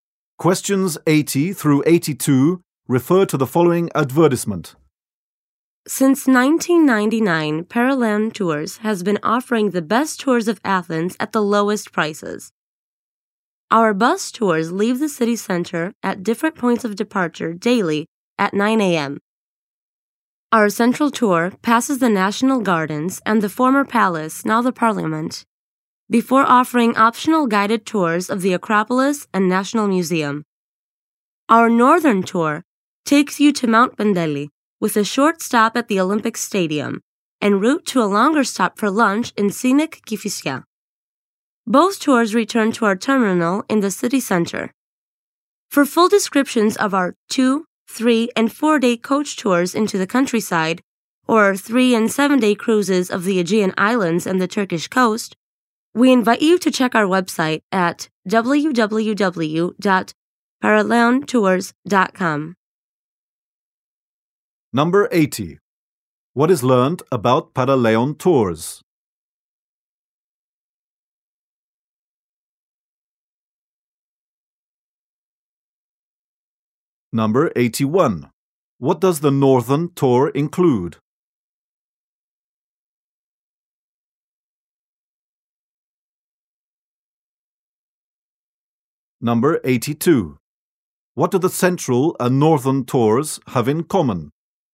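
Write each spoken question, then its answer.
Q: What is learned about Paraleon Tours?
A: It has offered low-priced tours of Athens since 1999.

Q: What does the Northern Tour include?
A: Mount Pendeli, a short stop at the Olympic Stadium, and lunch in Kifisia

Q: What do the Central and Northern Tours have in common?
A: Both leave daily at 9 a.m. and return to the terminal in the city center.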